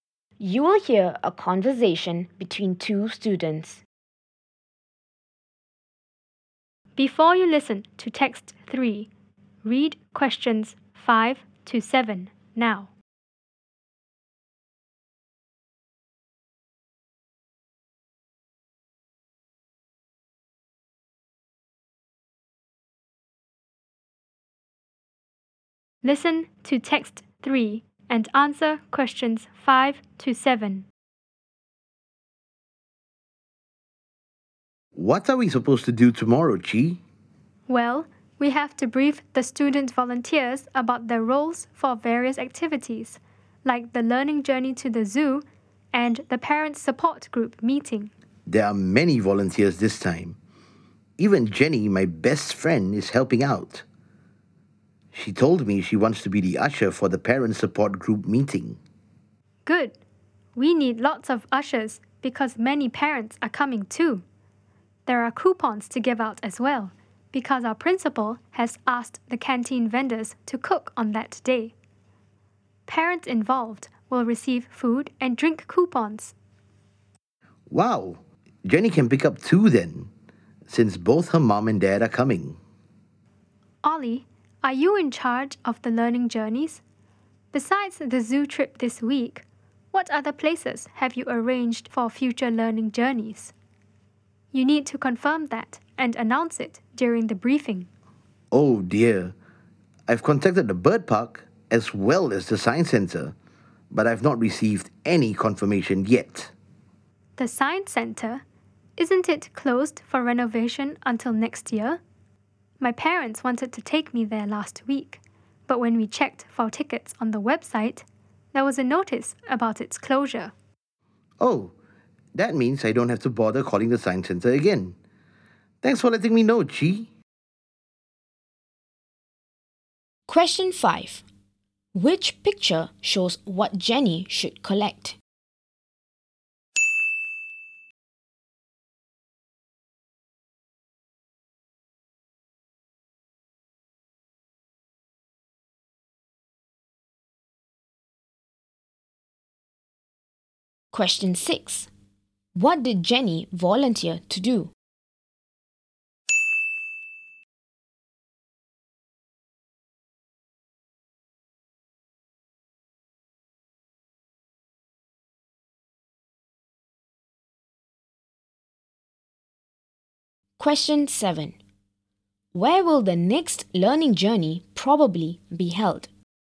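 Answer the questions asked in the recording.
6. Be an usher for the parent support group meeting
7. The bird park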